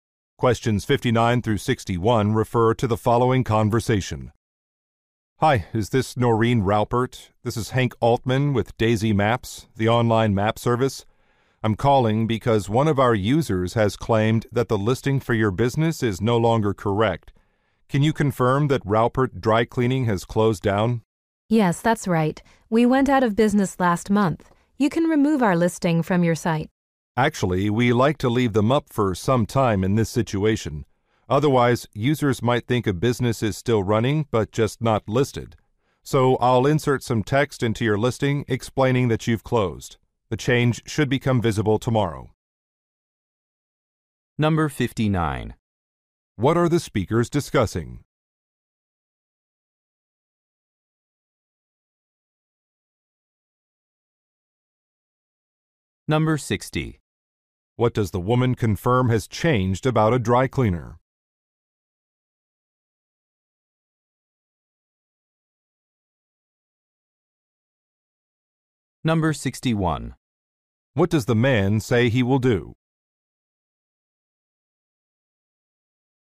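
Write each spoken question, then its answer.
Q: What are the speakers discussing?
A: A business listing on an online map service

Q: What does the woman confirm has changed about a dry cleaner?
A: It has closed down

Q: What does the man say he will do?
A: Add text to the listing explaining that the business has closed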